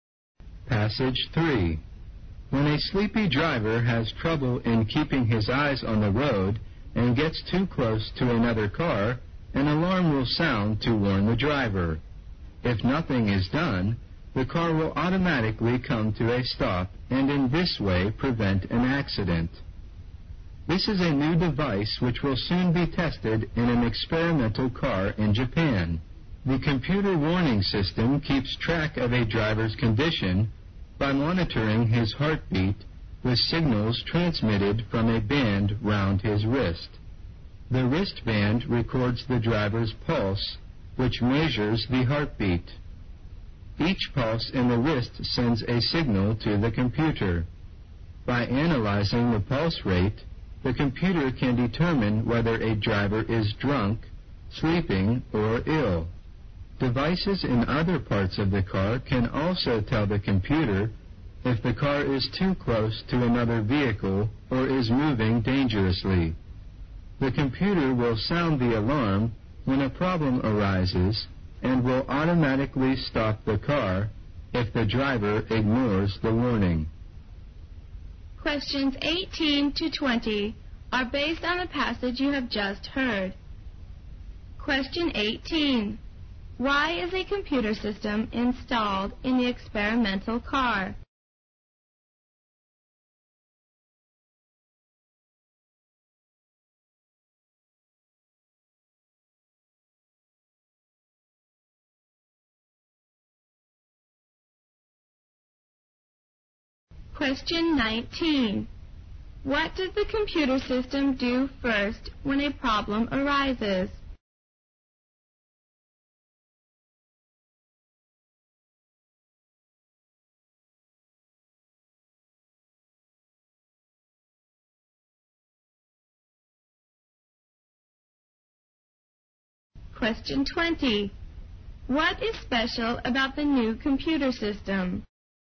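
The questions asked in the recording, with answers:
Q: Why is a computer system installed in the experimental car?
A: To prevent accidents.

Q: What does the computer system do first when a problem arises?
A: It sounds an alarm.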